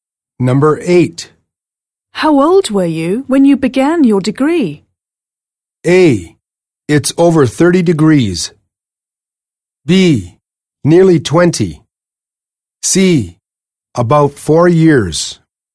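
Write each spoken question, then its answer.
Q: How old were you when you began your degree?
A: B: Nearly 20.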